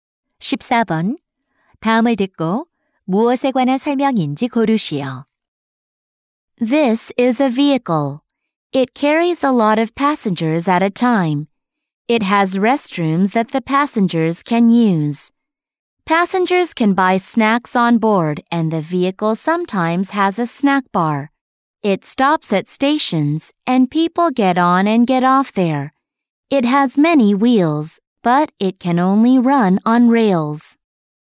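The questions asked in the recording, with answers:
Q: 다음을 듣고 무엇에 관한 설명인지 고르시오.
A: 기차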